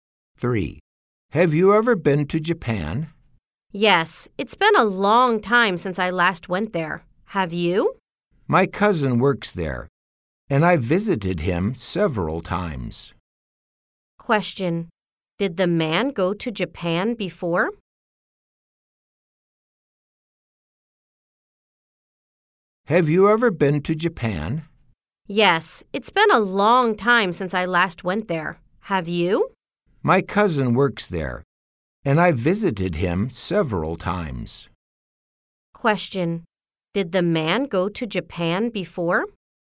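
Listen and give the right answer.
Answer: Yes, he did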